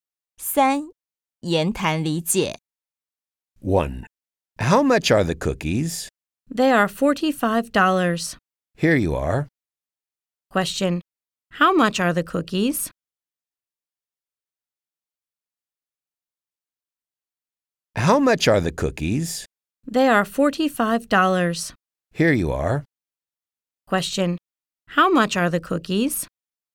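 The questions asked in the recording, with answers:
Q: How much are the cookies?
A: $45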